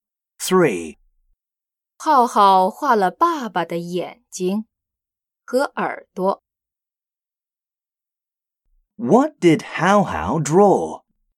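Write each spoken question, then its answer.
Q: What did Hao Hao draw?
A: Dad's eyes and ears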